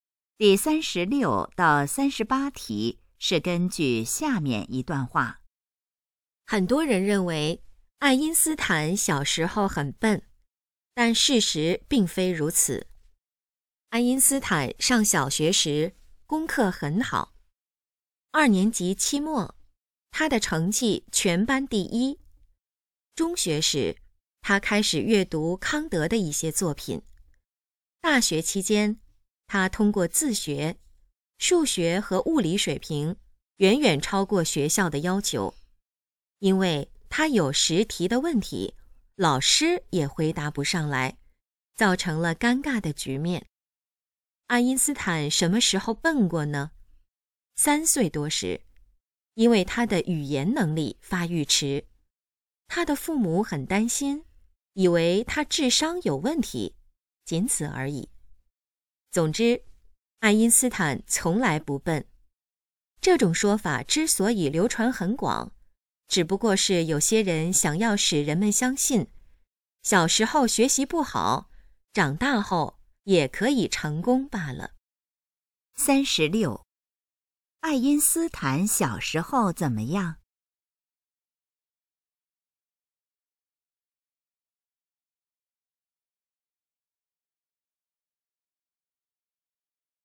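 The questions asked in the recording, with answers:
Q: 大学时,爱因斯坦自学了什么课程?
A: 数学和物理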